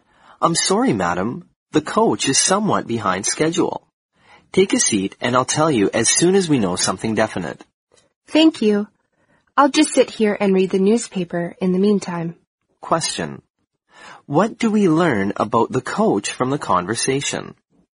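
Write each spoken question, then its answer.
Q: What do we learn about the coach from the conversation?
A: It is running late.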